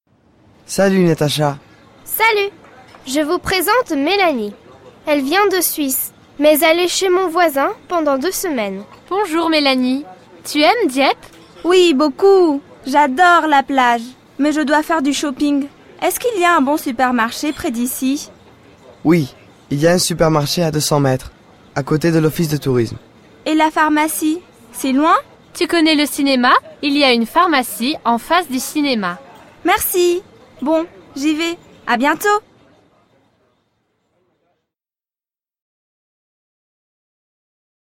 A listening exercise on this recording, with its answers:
Écoute et réponds:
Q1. À quelle distance se trouve le supermarché?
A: Le supermarché se trouve à deux cents mètres

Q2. C'est où le supermarché?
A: Le supermarché est à côté de l'office du tourisme.

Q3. C'est où la pharmacie?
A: La pharmacie est en face du cinéma.

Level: 2o ESO